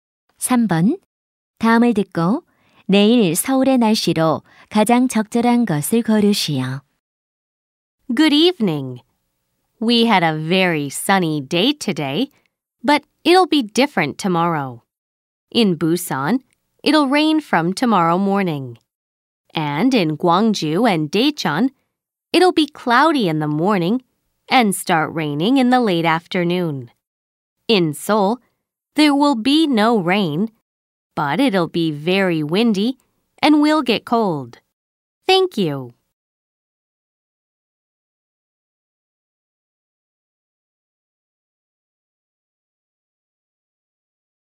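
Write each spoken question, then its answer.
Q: 다음을 듣고 내일 서울의 날씨로 가장 적절한 것을 고르시오.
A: 비는 안 오지만 바람이 많이 불고 추움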